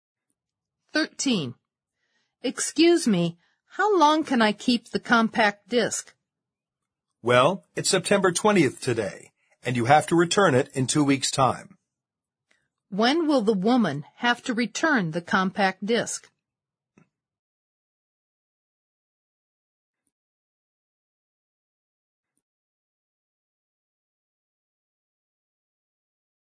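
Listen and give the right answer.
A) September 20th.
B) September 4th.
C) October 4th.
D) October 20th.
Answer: C) October 4th.

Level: 四级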